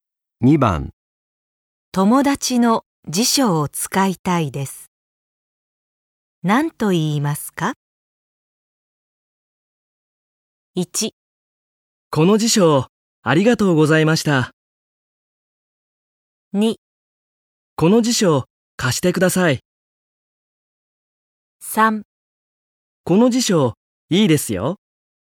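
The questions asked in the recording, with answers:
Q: 友達の辞書を使いたいです。何と言いますか?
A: 2: この辞書、貸してください。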